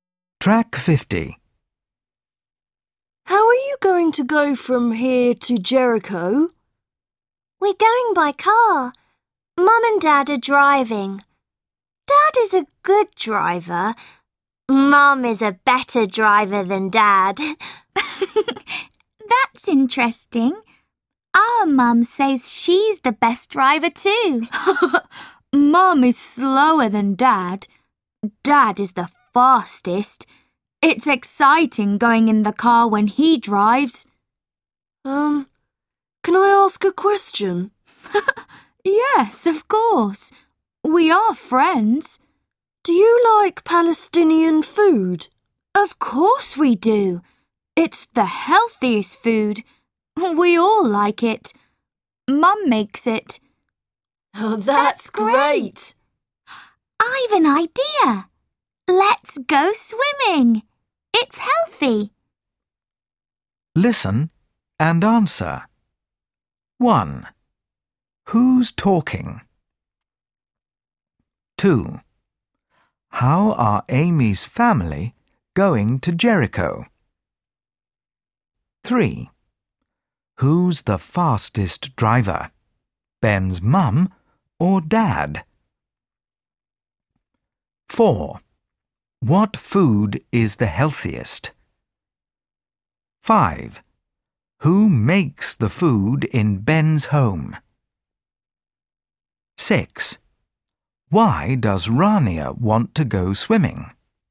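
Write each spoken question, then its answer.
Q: How are Amy's family going to Jericho.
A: By car

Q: Who's the fastest driver? Ben's mum or dad?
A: Dad

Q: What food is the healthiest?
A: Palestinian food

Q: Who makes the food in Ben's home?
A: Mum

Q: Why does Rania want to go swimming?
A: Because it's healthy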